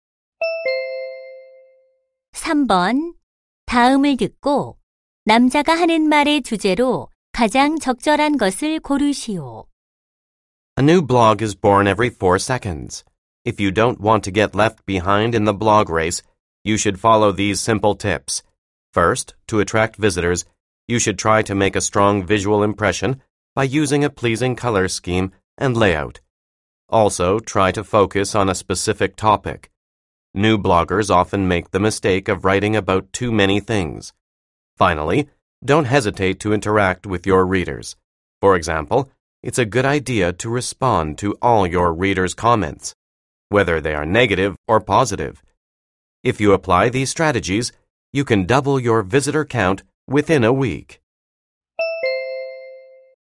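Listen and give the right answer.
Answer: 블로그 방문자를 늘리는 방법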